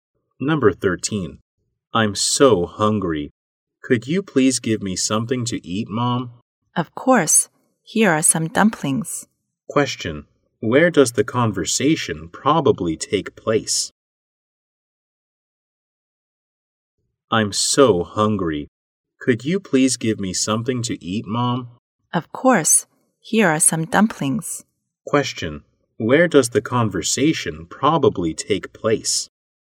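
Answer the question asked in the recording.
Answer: At home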